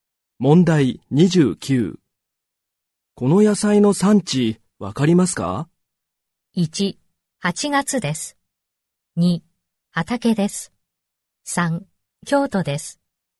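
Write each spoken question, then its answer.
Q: この野菜の産地わかりますか?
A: 3: 京都です。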